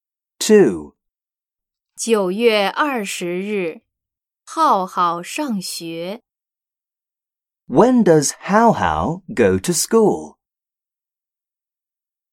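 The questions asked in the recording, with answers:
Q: When does Hao Hao go to school?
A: On September 20th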